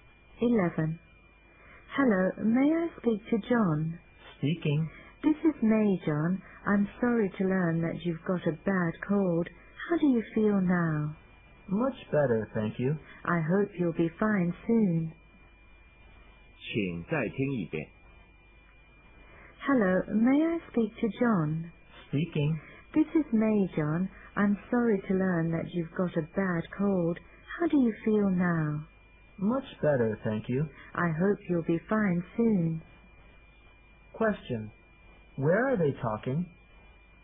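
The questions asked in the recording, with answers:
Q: Question. Where are they talking?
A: On the phone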